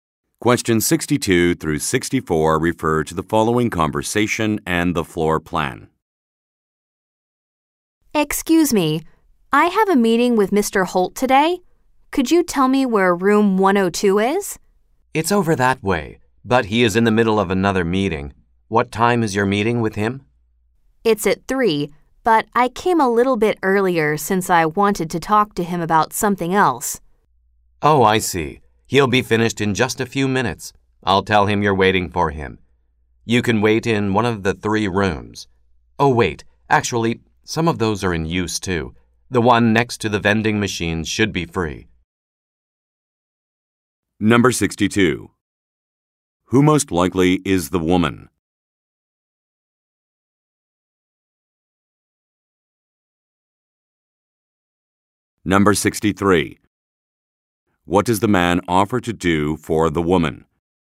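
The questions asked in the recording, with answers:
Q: What does the man offer to do for the woman?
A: Tell Mr. Holt that she is waiting for him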